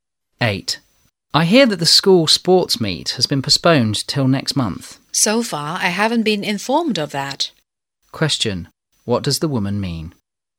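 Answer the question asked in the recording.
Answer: She hasn't heard that the sports meet was postponed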